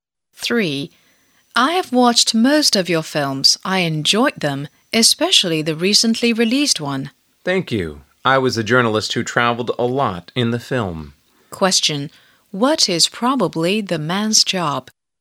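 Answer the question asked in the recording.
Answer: An actor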